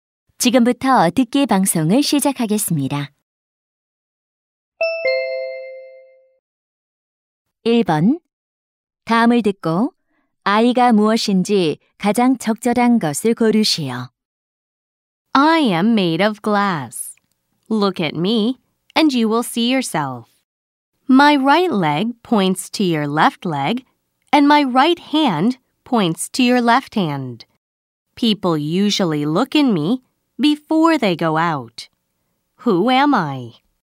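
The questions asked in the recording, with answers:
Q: 다음을 듣고 I가 무엇인지 가장 적절한 것을 고르시오.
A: 거울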